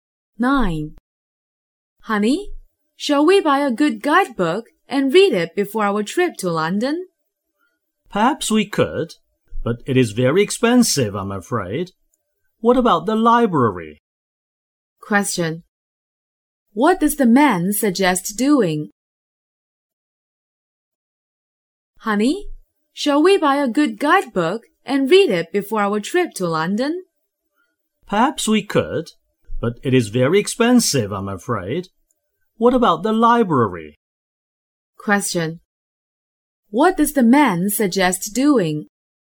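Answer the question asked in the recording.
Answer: Borrowing a guidebook from the library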